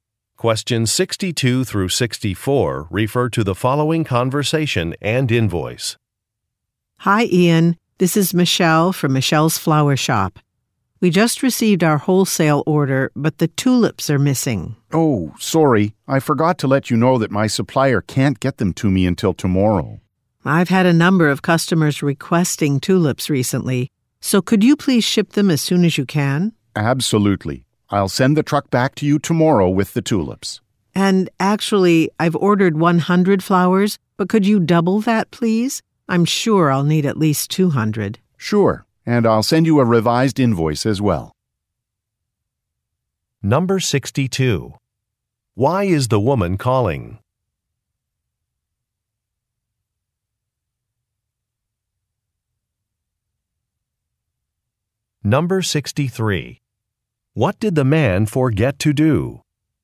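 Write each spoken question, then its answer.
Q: Why is the woman calling?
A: The tulips were missing from her wholesale order

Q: What did the man forget to do?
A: Tell her his supplier couldn't deliver the tulips until tomorrow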